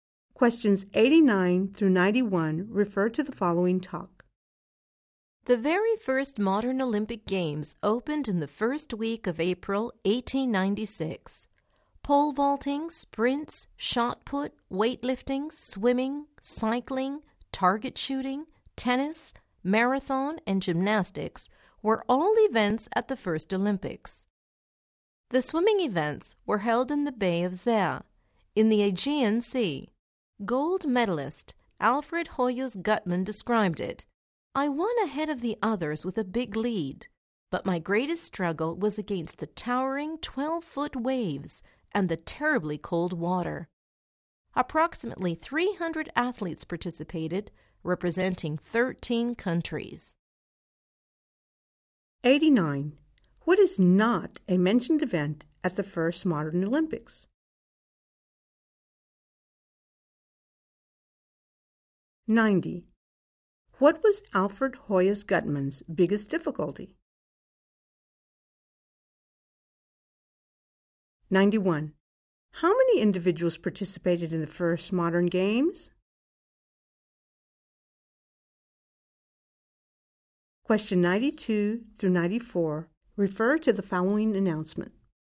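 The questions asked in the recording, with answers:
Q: What was Alfred Hoyas Guttmann's biggest difficulty?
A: The huge waves and the very cold water

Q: How many individuals participated in the first modern games?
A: About 300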